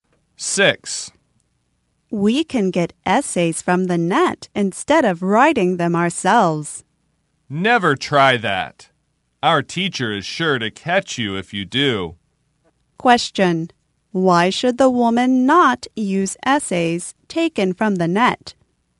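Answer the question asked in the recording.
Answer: Their teacher is sure to catch her.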